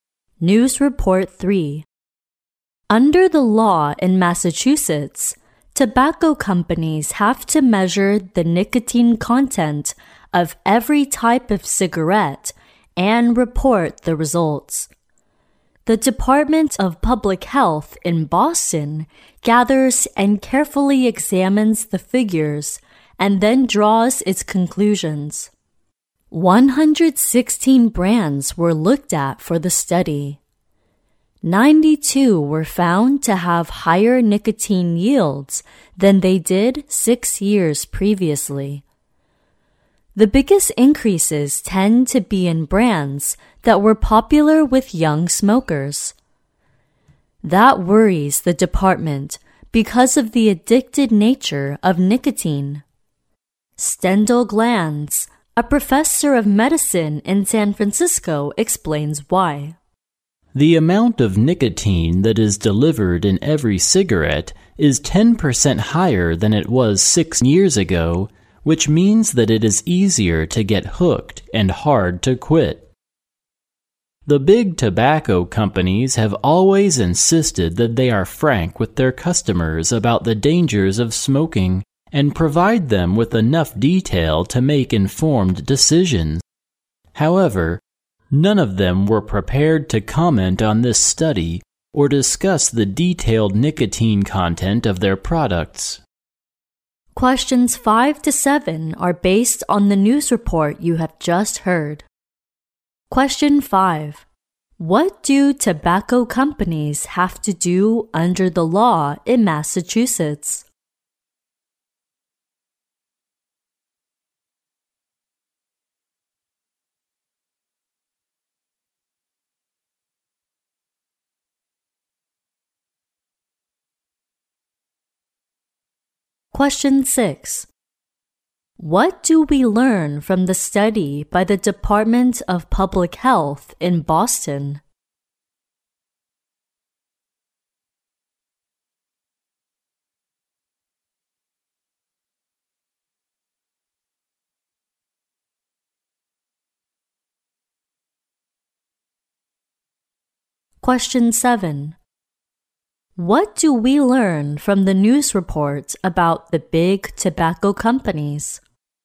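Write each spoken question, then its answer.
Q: What do tobacco companies have to do under the law in Massachusetts?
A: Measure the nicotine content of every type of cigarette and report the results

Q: What do we learn from the study by the Department of Public Health in Boston?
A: Most brands have higher nicotine yields than six years before

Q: What do we learn from the news report about the big tobacco companies?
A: They refused to comment on the study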